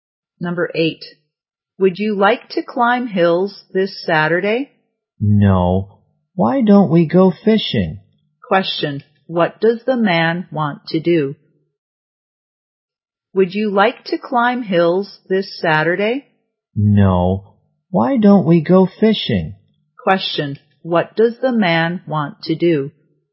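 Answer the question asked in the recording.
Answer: Go fishing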